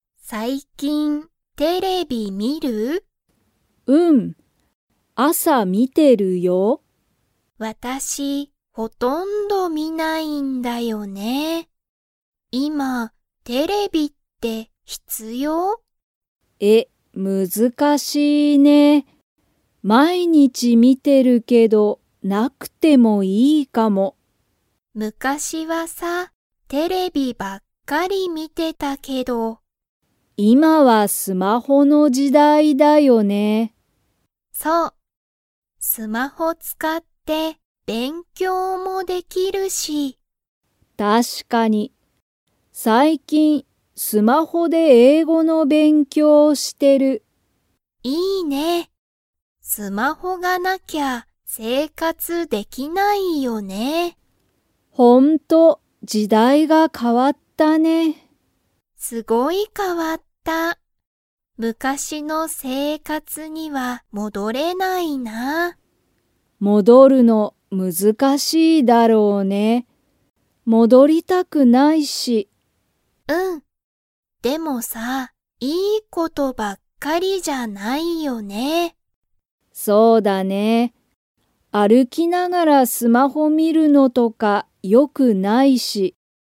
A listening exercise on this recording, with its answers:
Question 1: エミは、昔(むかし)は____見(み)ていた。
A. スマホも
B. テレビばっかり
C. 英語(えいご)も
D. 勉強(べんきょう)ばっかり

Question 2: エミは、昔(むかし)の生活(せいかつ)に戻(もど)れると思(おも)っていますか?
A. はい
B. いいえ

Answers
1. B
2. B

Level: Level 2

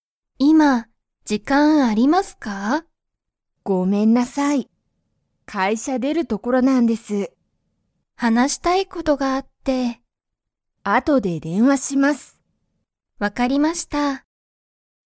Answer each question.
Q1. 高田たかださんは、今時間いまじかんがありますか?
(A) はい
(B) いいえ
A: B

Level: Level 1

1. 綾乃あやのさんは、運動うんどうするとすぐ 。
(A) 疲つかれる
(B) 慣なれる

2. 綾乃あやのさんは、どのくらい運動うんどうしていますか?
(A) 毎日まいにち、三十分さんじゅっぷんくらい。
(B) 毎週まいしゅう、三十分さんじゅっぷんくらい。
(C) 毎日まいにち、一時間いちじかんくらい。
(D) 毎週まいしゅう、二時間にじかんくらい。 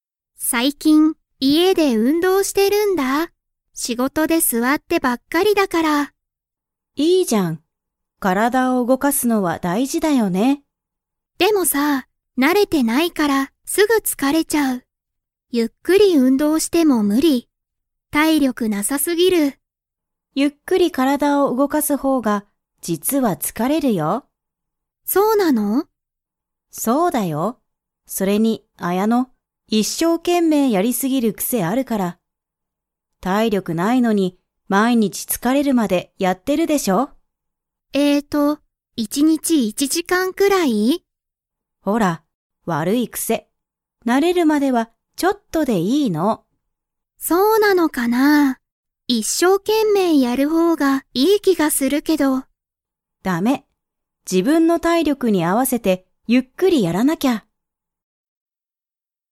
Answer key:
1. A
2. C

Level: Level 4

